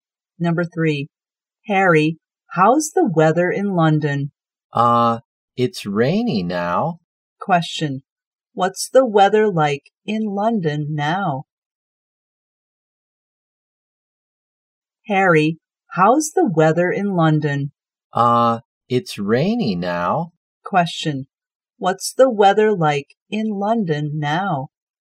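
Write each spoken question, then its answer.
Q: Question, what's the weather like in London now?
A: Rainy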